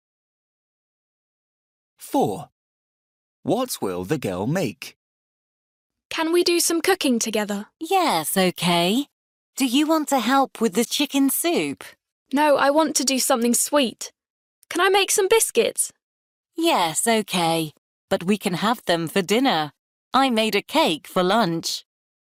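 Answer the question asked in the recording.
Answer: Biscuits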